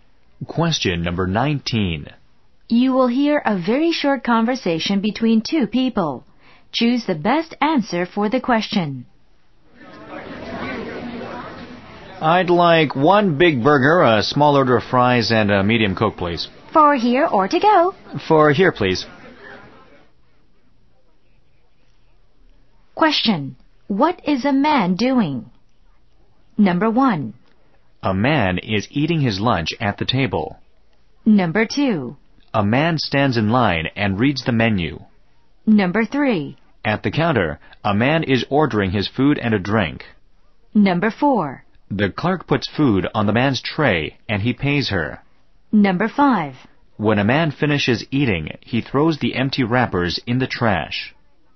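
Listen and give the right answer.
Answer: 3: At the counter, a man is ordering his food and a drink.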